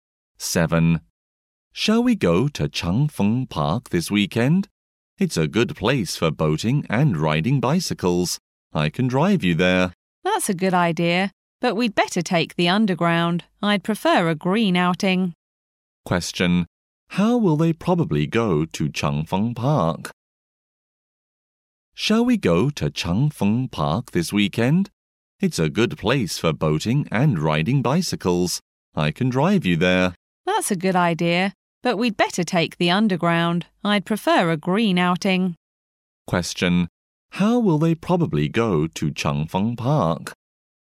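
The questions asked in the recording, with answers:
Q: Question. How will they probably go to Cheng Feng Park?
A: By underground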